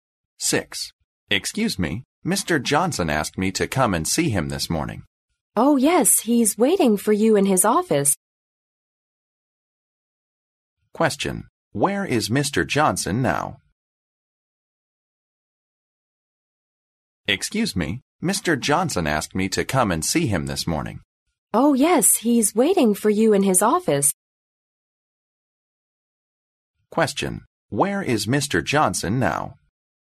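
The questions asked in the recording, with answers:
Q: Where is Mr. Johnson now?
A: In his office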